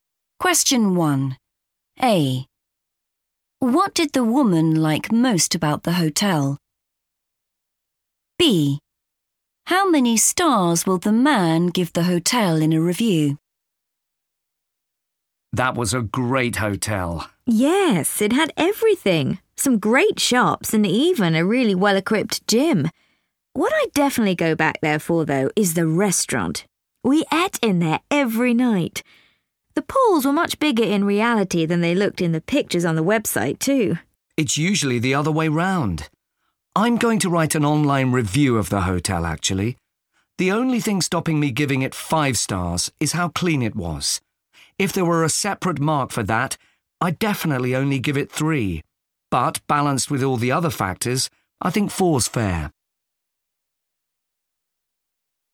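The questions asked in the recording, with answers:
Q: What did the woman like most about the hotel?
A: the restaurant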